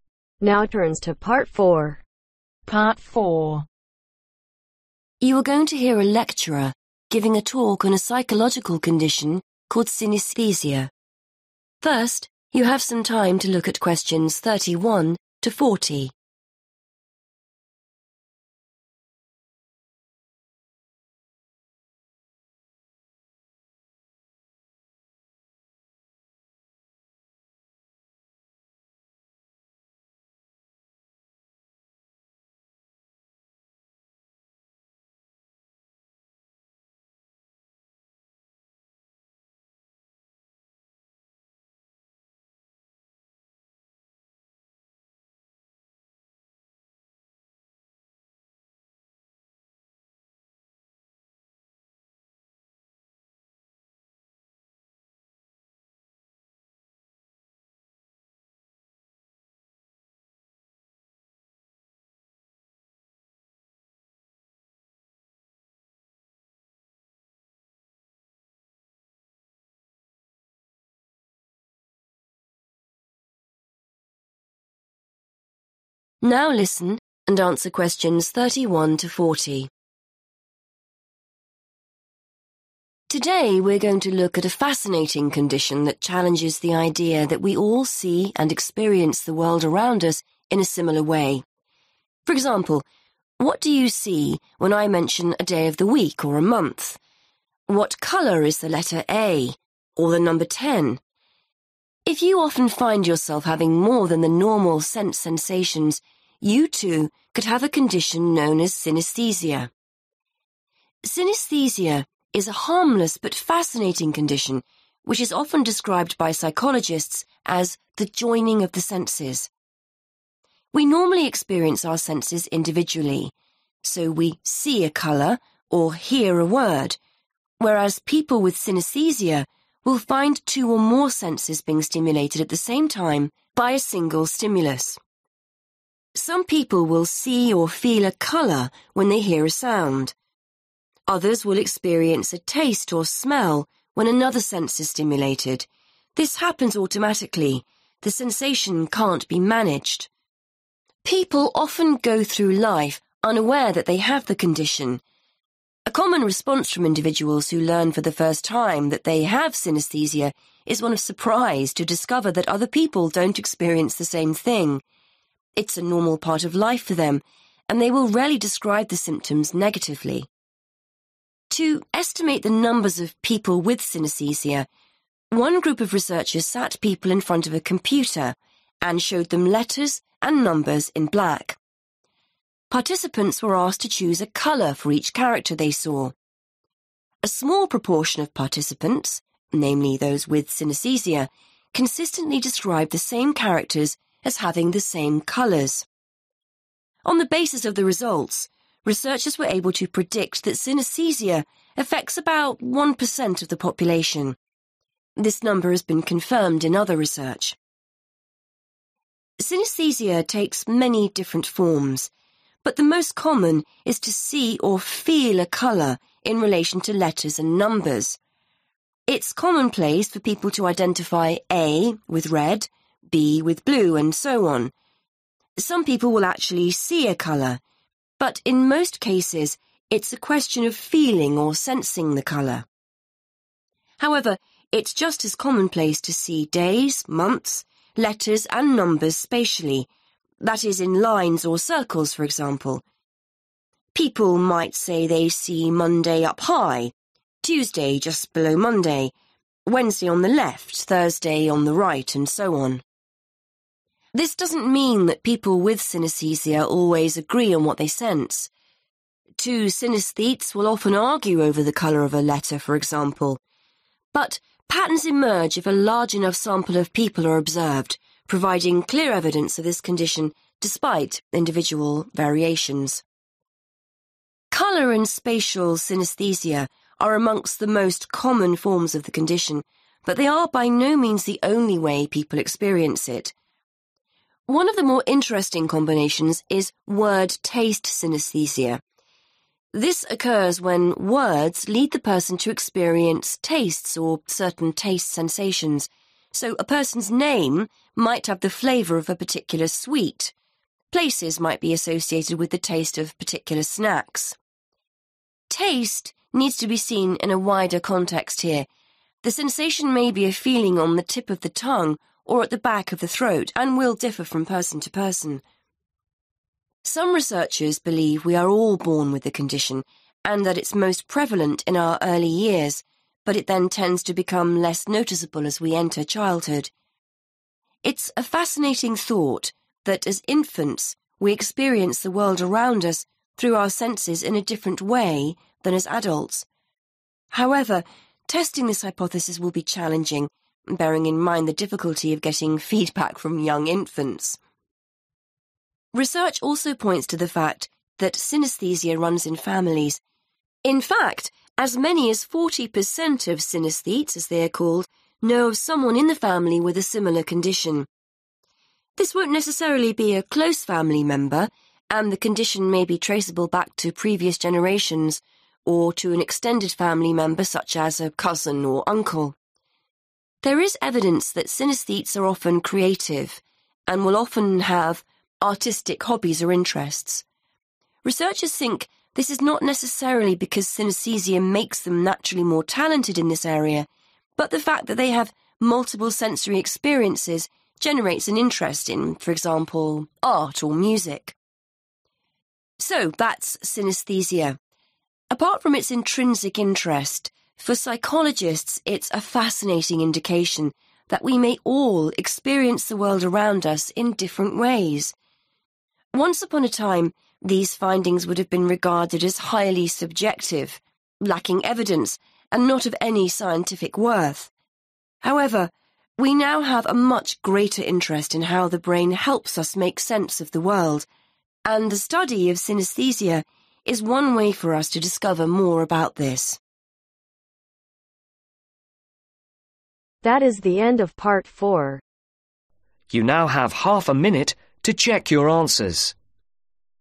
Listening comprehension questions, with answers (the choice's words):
Choose the correct letter , A , B or C.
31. The symptoms of synaesthesia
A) are the same for everyone with the condition.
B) cannot be controlled.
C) can be harmful.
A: cannot be controlled.

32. People who discover that they have synaesthesia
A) often say they thought everyone experienced it.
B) express negative feelings about their condition.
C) wonder what it is like to be normal.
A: often say they thought everyone experienced it.

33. One research project looking at synaesthesia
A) produced different result from other research.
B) was able to estimate the proportion of people with the condition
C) found that a small number of people saw different colors.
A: was able to estimate the proportion of people with the condition

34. The condition means some people see numbers of letters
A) as either red or blue.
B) as days or months.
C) as colors or in particular relative positions.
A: as colors or in particular relative positions.

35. The way people experience colors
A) will be exactly the same for everyone.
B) can lead to this agreements.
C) differs when a large number of experiments are carried out.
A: can lead to this agreements.

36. When seeing certain in words, people with word-taste synaesthesia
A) will the differ in the way they 'taste' a word.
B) generally get a sweet taste in their mouth.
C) have similar experience.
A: will the differ in the way they 'taste' a word.

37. What does the speaker say about synaesthesia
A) Infants may all have the condition.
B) It is difficult to prove that the condition exists.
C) The condition becomes more noticeable during childhood.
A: Infants may all have the condition.

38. Family members with synaesthesia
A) are not always closely related.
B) may not have the same symptoms.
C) make up forty per cent of the extended family.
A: are not always closely related.

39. People with synaesthesia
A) are advised to take up a hobby or interest.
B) are often talented artists.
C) often take an interest in the arts.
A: often take an interest in the arts.

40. What attitude to scientists have towards synaesthesia nowadays ?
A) It has little scientific worth.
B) It may them better understand how the brain functions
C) They need more proof.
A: It may them better understand how the brain functions